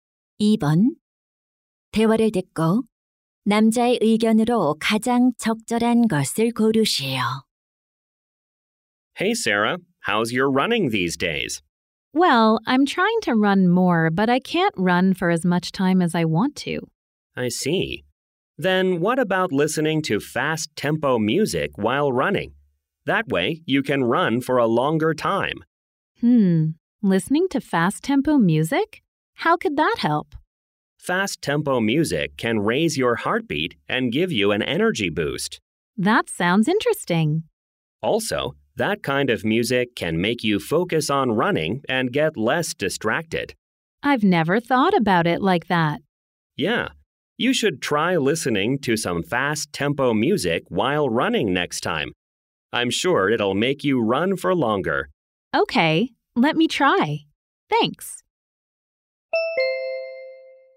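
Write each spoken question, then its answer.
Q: 대화를 듣고 남자의 의견으로 가장 적절한 것을 고르시오.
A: 달리기를 할 때 빠른 템포의 음악을 들으면 더 오래 달릴 수 있다.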